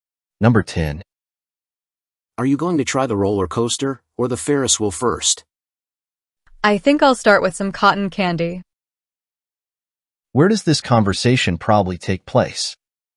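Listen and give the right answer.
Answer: At an amusement park.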